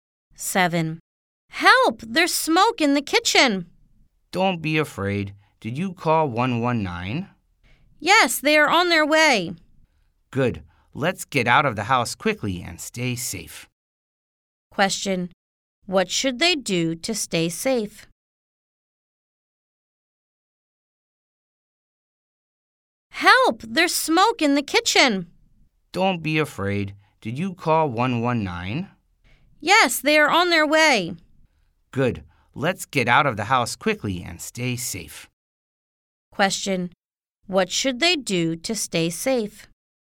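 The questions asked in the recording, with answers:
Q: What should they do to stay safe?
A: Get out of the house quickly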